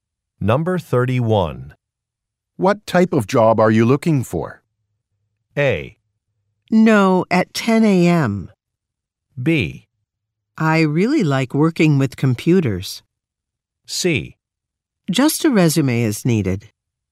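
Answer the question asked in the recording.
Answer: B: I really like working with computers.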